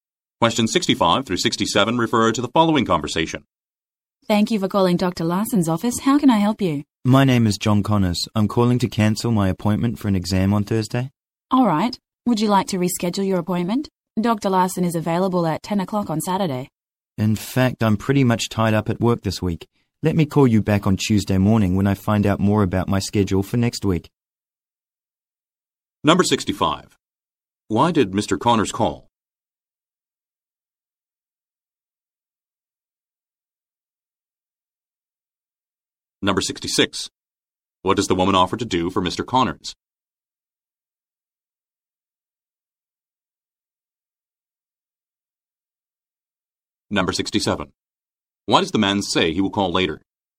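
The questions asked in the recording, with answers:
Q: Why did Mr. Connors call?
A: To cancel his appointment

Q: What does the woman offer to do for Mr. Connors?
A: Reschedule his appointment

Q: Why does the man say he will call later?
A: He needs to find out his schedule for next week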